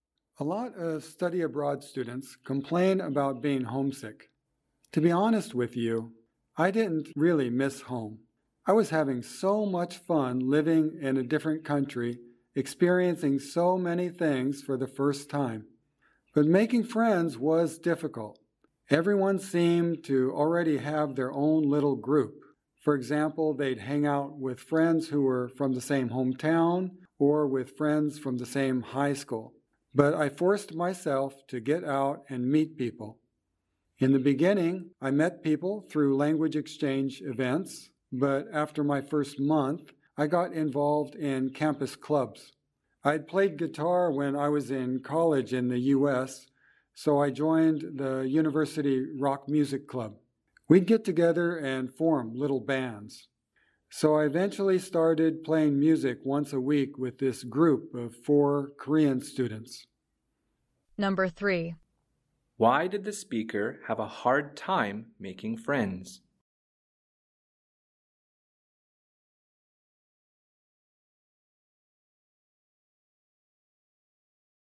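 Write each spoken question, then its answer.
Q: Why did the speaker have a hard time making friends?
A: Everyone seemed to already have their own little group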